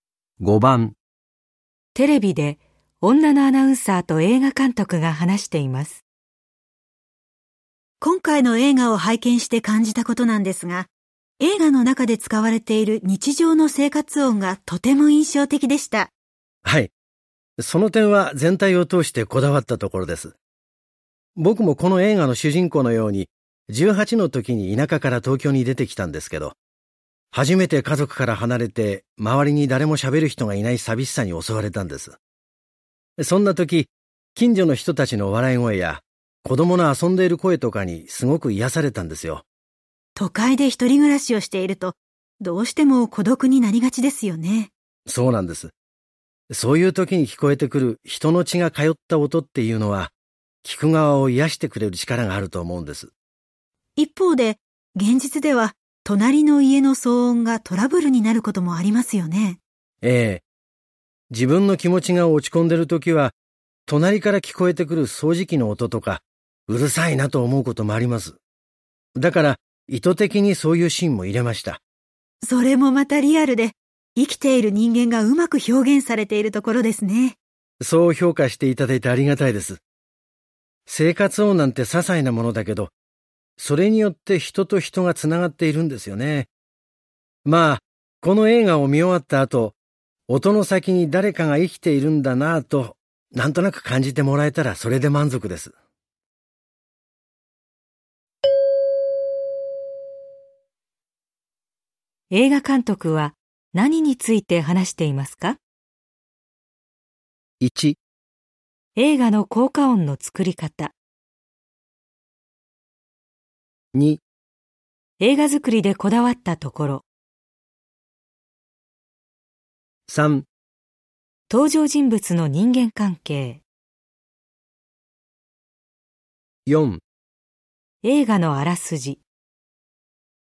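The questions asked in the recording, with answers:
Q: 映画監督は何について話していますか?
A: 2: 映画作りでこだわったところ。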